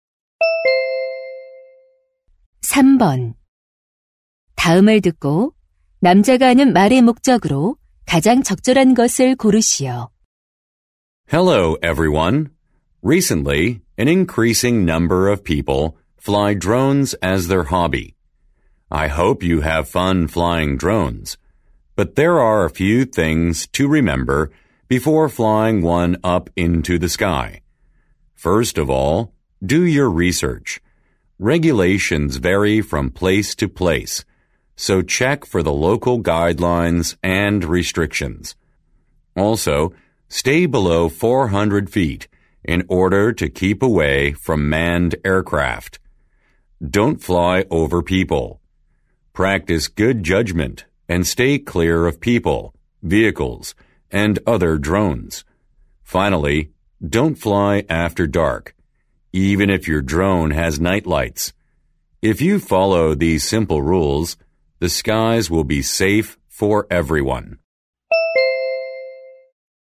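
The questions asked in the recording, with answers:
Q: 다음을 듣고 남자가 하는 말의 목적으로 가장 적절한 것을 고르시오.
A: 드론을 날리기 전 지켜야 할 안전 수칙을 안내하려고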